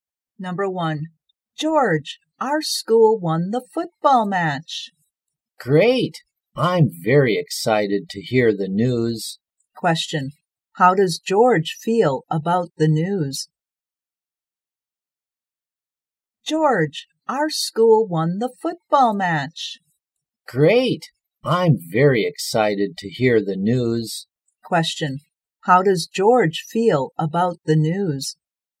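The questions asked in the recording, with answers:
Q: Question, how does George feel about the news?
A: Excited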